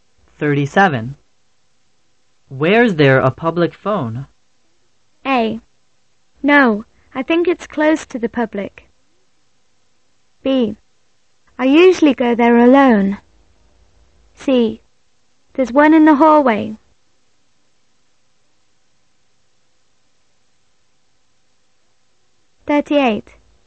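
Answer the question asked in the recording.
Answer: C: There's one in the hallway.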